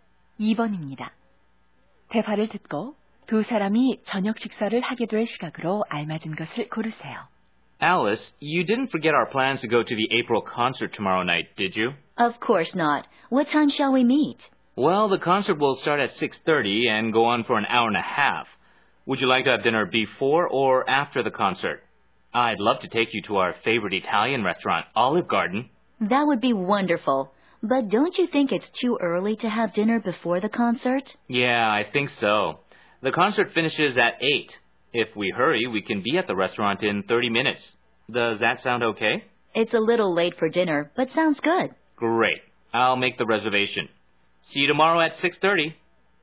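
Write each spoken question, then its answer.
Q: 대화를 듣고 두 사람이 저녁 식사를 하게 될 시각으로 알맞은 것을 고르세요.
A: 8시 30분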